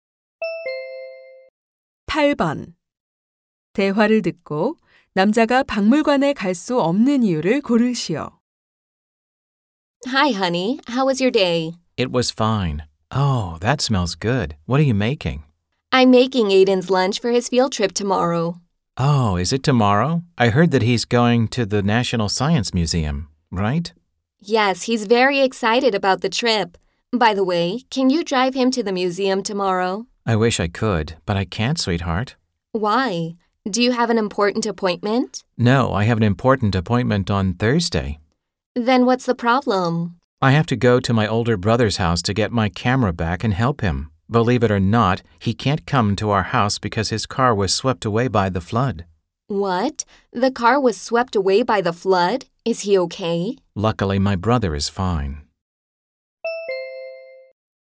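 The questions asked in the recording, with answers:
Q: 대화를 듣고 남자가 박물관에 갈 수 없는 이유를 고르시오.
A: 차가 홍수에 떠내려간 형을 도우러 형 집에 가야 해서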